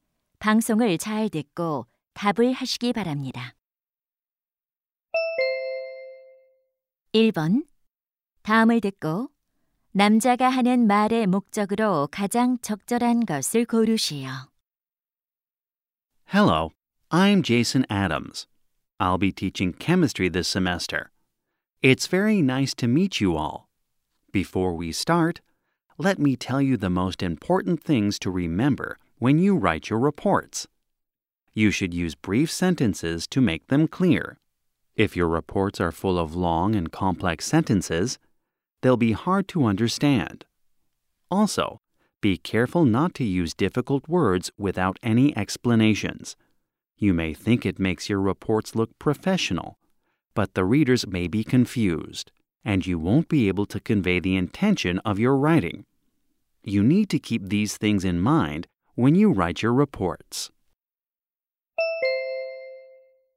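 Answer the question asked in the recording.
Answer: 보고서를 쓸 때 짧은 문장과 쉬운 단어를 사용하라고 당부하려고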